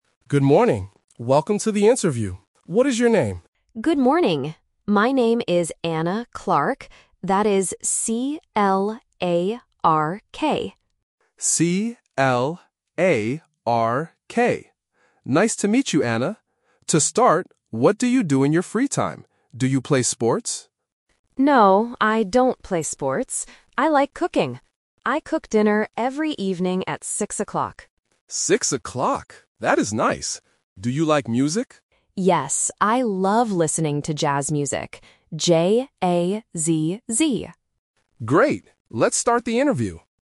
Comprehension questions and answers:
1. How do you spell the candidate's last name?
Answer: C-L-A-R-K

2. What does Anna do in her free time?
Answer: She cooks dinner.

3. What kind of music does Anna love?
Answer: Jazz music.

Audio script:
Interviewer: Good morning. Welcome to the interview. What is your name?
Candidate: Good morning. My name is Anna Clark. That is C-L-A-R-K.
Interviewer: C-L-A-R-K. Nice to meet you, Anna. To start, what do you do in your free time? Do you play sports?
Candidate: No, I don't play sports. I like cooking. I cook dinner every evening at six o'clock.
Interviewer: Six o'clock. That is nice. Do you like music?
Candidate: Yes, I love listening to jazz music. J-A-Z-Z.